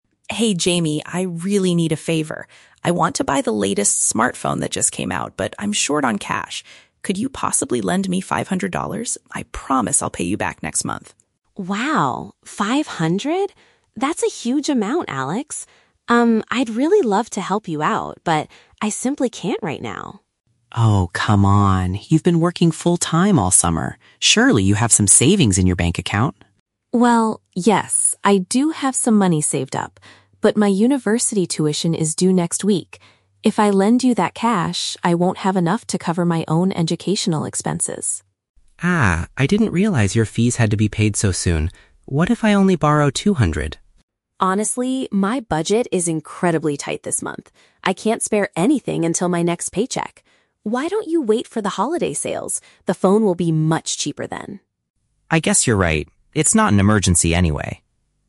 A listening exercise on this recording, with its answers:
Listen to a conversation between two friends and choose the correct answer (A, B, or C) for each question.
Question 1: Why does Alex ask Jamie for money?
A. To pay for his university tuition fees.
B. To purchase a new electronic device.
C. To buy a special gift for the holidays.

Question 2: What is the main reason Jamie refuses to lend the money?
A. She hasn't received her paycheck for her summer job yet.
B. She thinks the amount Alex is asking for is too small.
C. She needs her savings to pay for her educational expenses.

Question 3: What does Jamie suggest Alex should do?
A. Delay his purchase until the prices drop.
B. Borrow a smaller amount, like two hundred dollars.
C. Find a full-time job during the summer.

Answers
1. B
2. C
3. A

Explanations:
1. Alex says he wants to buy the "latest smartphone." "A new electronic device" is a paraphrase for a new smartphone. Why the trap is wrong: Option (A) is the trap. The "university tuition fees" are Jamie's expenses, not Alex's reason for needing money. Option (C) is a trap because Jamie mentions "holiday sales" later, but Alex is not buying a holiday gift.
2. Jamie explains that her "university tuition is due next week" and she needs to cover her "educational expenses." Why the trap is wrong: Option (A) is the trap. Alex mentions she has been working all summer, and Jamie says she can't spare anything "until my next paycheck," but she does have savings right now—she just needs them for tuition. Option (B) is a trap because she actually thinks $500 is a "huge amount," not too small.
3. Jamie advises Alex to "wait for the holiday sales" because the phone will be "much cheaper then." This means delaying the purchase until prices drop. Why the trap is wrong: Option (B) is the trap. Borrowing "two hundred" was Alex's second suggestion, which Jamie also rejected. Option (C) is a trap because working a full-time summer job is what Jamie did, not what she suggests Alex do.

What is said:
Alex: Hey Jamie, I really need a favor. I want to buy the latest smartphone that just came out, but I'm short on cash. Could you possibly lend me five hundred dollars? I promise I'll pay you back next month.
That's a huge amount, Alex. Um, I'd really love to help you out, but I simply can't right now.
Alex: Oh, come on! You've been working full-time all summer. Surely you have some savings in your bank account?
Jamie: Well, yes, I do have some money saved up. But my university tuition is due next week. If I lend you that cash, I won't have enough to cover my own educational expenses.
Alex: Ah, I didn't realize your fees had to be paid so soon. What if I only borrow two hundred?
Jamie: Honestly, my budget is incredibly tight this month. I can't spare anything until my next paycheck. Why don't you wait for the holiday sales? The phone will be much cheaper then.
Alex: I guess you're right. It's not an emergency anyway.

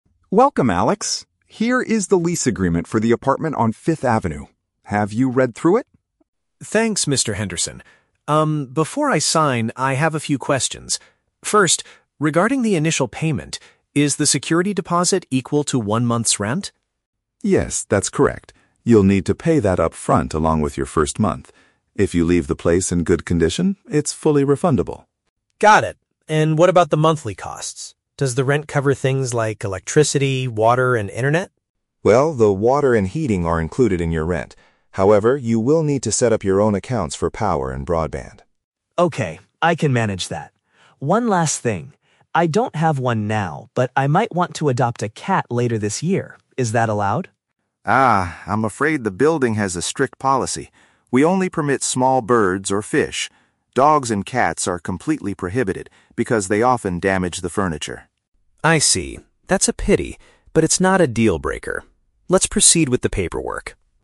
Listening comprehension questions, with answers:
Listen to the conversation between an international student and a real estate agent. Read the questions below and choose the correct answer (A, B, or C) for each.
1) Which living expenses must the student pay for separately?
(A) The water supply and the heating system.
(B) The electricity and the internet connection.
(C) The monthly maintenance and parking fees.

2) Why does the landlord refuse to allow cats in the apartment?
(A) Because they tend to ruin the items inside the flat.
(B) Because the neighbors have complained about noisy pets before.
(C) Because the student refused to pay an extra animal deposit.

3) How does the student feel about the building's rule regarding animals?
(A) He is extremely angry and decides to cancel the housing contract.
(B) He is slightly disappointed but agrees to sign the document anyway.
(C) He is relieved because he actually has a fear of large dogs.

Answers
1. B
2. A
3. B

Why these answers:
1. The agent says the student needs to set up his own accounts for "power and broadband." (Paraphrased: power = electricity; broadband = internet connection). The Trap: Option (A) is incorrect because the agent explicitly states that "water and heating are included in your rent," meaning the student does not pay for them separately. Not mentioned: Option (C) is plausible for an apartment, but maintenance and parking are never mentioned.
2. The agent explains that dogs and cats are prohibited because "they often damage the furniture." (Paraphrased: damage = ruin; furniture = items inside the flat). The Trap: Option (B) is incorrect. The agent mentions dogs and cats, but does not mention anything about "noisy pets" or neighbors complaining. Not mentioned: Option (C) is a common real estate practice (pet deposit), but it is not discussed in the audio.
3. Alex says "That's a pity" (which shows he is slightly disappointed), but adds "it's not a dealbreaker. Let's proceed with the paperwork" (meaning he agrees to sign). The Trap: Option (A) is an extreme reaction. He is not angry and does not cancel the contract. Not mentioned: Option (C) is completely fabricated. He actually wanted to adopt a cat, so he is not relieved by the rule.

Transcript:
Mr. Henderson: Welcome, Alex. Here is the lease agreement for the apartment on 5th Avenue. Have you read through it?
Alex: Thanks, Mr. Henderson. Um, before I sign, I have a few questions. First, regarding the initial payment, is the security deposit equal to one month's rent?
Mr. Henderson: Yes, that's correct. You'll need to pay that upfront along with your first month. If you leave the place in good condition, it's fully refundable.
Alex: Got it. And what about the monthly costs? Does the rent cover things like electricity, water, and internet?
Mr. Henderson: Well, the water and heating are included in your rent. However, you will need to set up your own accounts for power and broadband.
Alex: Okay, I can manage that. One last thing. I don't have one now, but I might want to adopt a cat later this year. Is that allowed?
Mr. Henderson: Ah, I'm afraid the building has a strict policy. We only permit small birds or fish. Dogs and cats are completely prohibited because they often damage the furniture.
Alex: I see. That's a pity, but it's not a dealbreaker. Let's proceed with the paperwork.

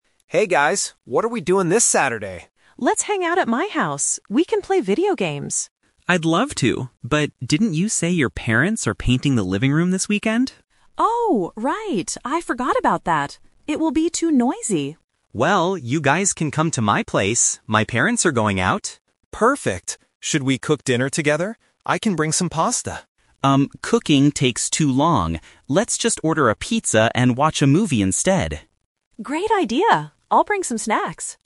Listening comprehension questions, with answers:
Listen to the conversation between three friends. Choose the correct answer (A, B, or C) for each question.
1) Where are the friends going to hang out this Saturday?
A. At Bella's house.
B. At Chris's house.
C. At a pizza restaurant.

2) Why can't they go to Bella's house?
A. Because her parents are painting the house.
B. Because her parents are going out.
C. Because she has to study for a test.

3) What will they have for dinner?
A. Pasta.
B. Pizza.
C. Sandwiches.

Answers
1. B
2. A
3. B

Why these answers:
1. This is the first "Twist". They originally talked about going to Bella's house, but they changed the plan. Chris says, "you guys can come to my place." Option (A) is a trap because it was the first idea. Option (C) is plausible because they eat pizza, but they are not going to a restaurant.
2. Chris reminds Bella that her parents are "painting the living room", which makes it too noisy. Option (B) is a trap because it is Chris's parents who are going out, not Bella's. Option (C) is not mentioned in the audio.
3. This is the second "Twist". Alex suggests cooking pasta, but Chris says cooking takes too long and suggests, "Let's just order a pizza... instead". Option (A) is the trap because it was suggested but rejected. Option (C) is not mentioned.

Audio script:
Alex: Hey guys, what are we doing this Saturday?
Bella: Let's hang out at my house! We can play video games.
Chris: I'd love to, but didn't you say your parents are painting the living room this weekend?
Bella: Oh, right. I forgot about that. It will be too noisy.
Chris: Well, you guys can come to my place. My parents are going out.
Alex: Perfect! Should we cook dinner together? I can bring some pasta.
Chris: Um, cooking takes too long. Let's just order a pizza and watch a movie instead.

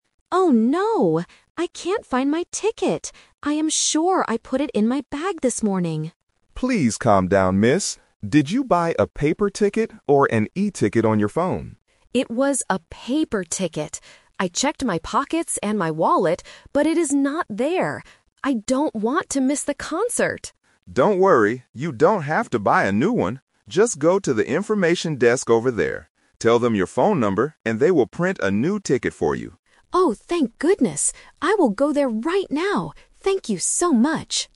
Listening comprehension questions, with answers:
Listen to the conversation between a spectator and a security guard. Choose the correct answer (A, B, or C) for each question.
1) What is the woman's problem?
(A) She forgot her phone at home.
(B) She cannot find her concert ticket.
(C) She left her bag in her car.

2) Where did the woman look for her ticket?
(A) In her pockets and wallet.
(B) At the information desk.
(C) On her mobile phone.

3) What does the security guard tell her to do?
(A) Buy a new ticket at the desk.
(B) Go home and find the ticket.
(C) Give her phone number to the information desk.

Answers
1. B
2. A
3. C

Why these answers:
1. The woman says clearly at the beginning: "Oh no! I can't find my ticket." Option (A) is a trap because the word "phone" is mentioned later, but she didn't forget it. Option (C) is a trap; she mentions her bag ("I put it in my bag"), but she didn't leave it in the car.
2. The woman states: "I checked my pockets and my wallet, but it is not there." Option (B) is a trap because the information desk is where she will go next, not where she looked. Option (C) is the A2 Trap; the guard asks if she has an e-ticket on her phone, but she says she had a paper ticket.
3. The guard instructs her: "Just go to the information desk... Tell them your phone number..." Option (A) is the A2 Twist/Trap; she is worried about this, but the guard explicitly says, "you don't have to buy a new one." Option (B) is plausible in real life but is never mentioned in the audio.

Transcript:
Woman: Oh no! I can't find my ticket. I am sure I put it in my bag this morning.
Man: Please calm down, miss. Did you buy a paper ticket or an e-ticket on your phone?
Woman: It was a paper ticket. I checked my pockets and my wallet, but it is not there. I don't want to miss the concert!
Man: Don't worry, you don't have to buy a new one. Just go to the information desk over there. Tell them your phone number, and they will print a new ticket for you.

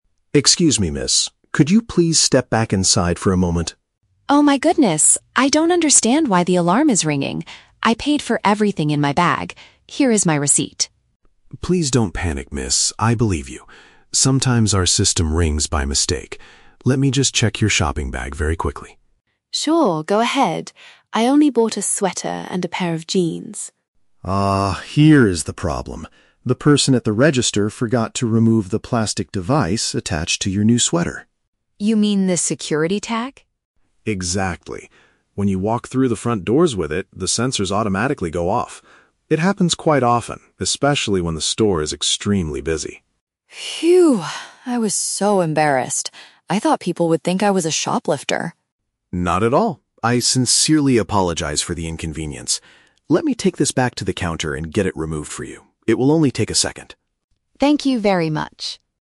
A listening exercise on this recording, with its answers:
Listen to the conversation between a customer and a security guard. Choose the correct answer (A, B, or C) for each question.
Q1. Why is the customer feeling upset at the beginning?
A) The store's warning system made a loud noise.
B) A security guard accused her of stealing jeans.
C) She could not find the receipt for her items.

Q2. What caused the security issue at the door?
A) The customer tried to hide a sweater in her bag.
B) A store worker failed to take off a protective item.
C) The electronic sensors at the front door were broken.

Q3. What does the security guard offer to do at the end?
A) Ask the person at the register to give her a refund.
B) Give the customer a special discount for her next visit.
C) Carry the clothing to the desk to detach the device.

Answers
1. A
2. B
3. C

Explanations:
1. The customer is shocked and says, "I don't understand why the alarm is ringing." An alarm ringing means the warning system made a loud noise. The Trap (B): The customer mentions a "pair of jeans" and fears people might think she is a "shoplifter" (stealing), but the guard never accused her. He says, "I believe you." Plausible but not mentioned (C): Losing a receipt can make a customer upset, but she explicitly says, "Here is my receipt."
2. The guard explains, "The person at the register forgot to remove the plastic device." The person at the register is a store worker, and the plastic device is a protective item (security tag). The Trap (A): The audio mentions a "sweater" and her "bag," but she paid for it and did not try to hide it. Plausible but not mentioned (C): Broken sensors often cause false alarms, but in this case, the sensors were working correctly; it was a human error by the cashier.
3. The guard says, "Let me take this back to the counter and get it removed for you." Taking it to the counter means carrying it to the desk, and getting it removed means detaching the device. The Trap (A): The "person at the register" is mentioned earlier as the one who made the mistake, but the guard does not offer to ask them for a refund. Plausible but not mentioned (B): Offering a discount is a common way to apologize for an inconvenience in retail, but the guard only apologizes verbally and removes the tag.

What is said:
Security: Excuse me, miss. Could you please step back inside for a moment?
Customer: Oh my goodness! I don't understand why the alarm is ringing. I paid for everything in my bag. Here is my receipt.
Security: Please don't panic, miss. I believe you. Sometimes our system rings by mistake. Let me just check your shopping bag very quickly.
Customer: Sure, go ahead. I only bought a sweater and a pair of jeans.
Security: Ah, here is the problem. The person at the register forgot to remove the plastic device attached to your new sweater.
Customer: You mean the security tag?
Security: Exactly. When you walk through the front doors with it, the sensors automatically go off. It happens quite often, especially when the store is extremely busy.
Customer: Phew! I was so embarrassed. I thought people would think I was a shoplifter.
Security: Not at all. I sincerely apologize for the inconvenience. Let me take this back to the counter and get it removed for you. It will only take a second.

